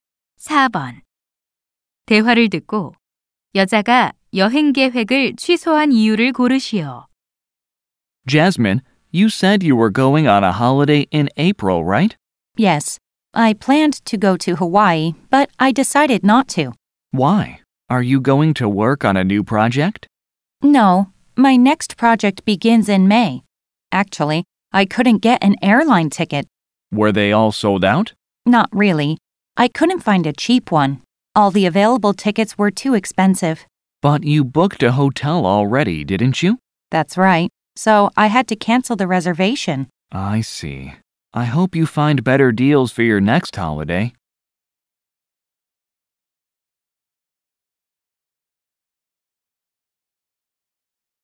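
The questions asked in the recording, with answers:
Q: 대화를 듣고 여자가 여행 계획을 취소한 이유를 고르시오.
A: 항공권이 너무 비싸서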